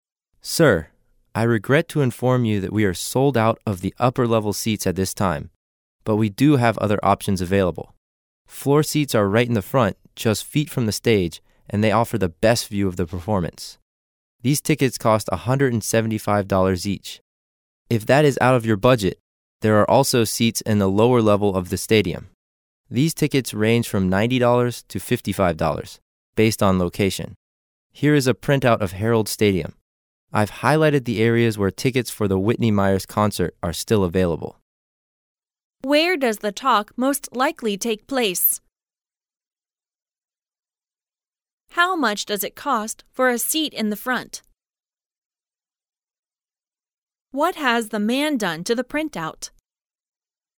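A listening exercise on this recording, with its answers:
How much does it cost for a seat in the front?______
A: $175

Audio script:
A
[听力原文] M: Sir, I regret to inform you that we are sold out of the upper-level seats at this time, but we do have other options available. Floor seats are right in the front, just feet from the stage, and they offer the best view of the performance. These tickets cost $175 dollars each. If that is out of your budget, there are also seats in the lower level of the stadium. These tickets range from $90 to $55, based on location. Here is a printout of Harold Stadium. I've highlighted the areas where tickets for the Whitney Myers concert are still available.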